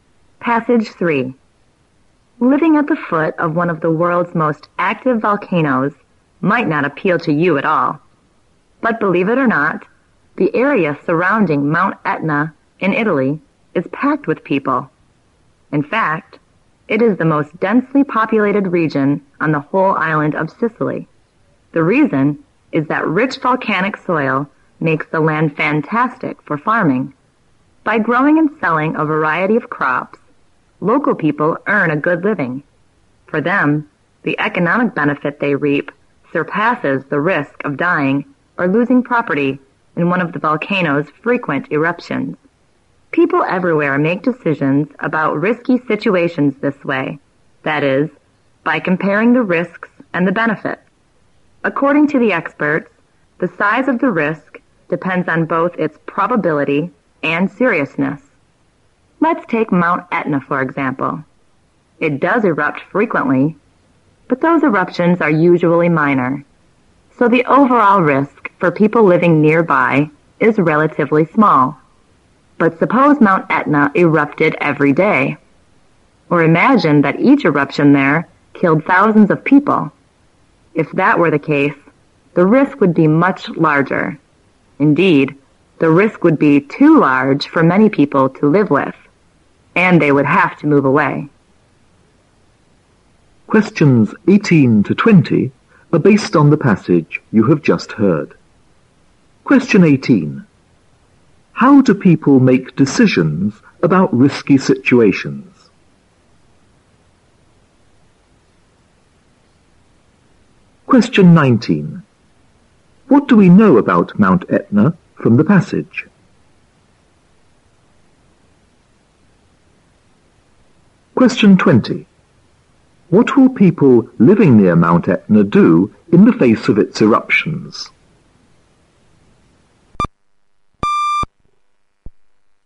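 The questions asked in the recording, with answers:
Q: How do people make decisions about risky situations?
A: By comparing the risks and the benefits

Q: What do we know about Mount Etna from the passage?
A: It erupts often, but its eruptions are usually minor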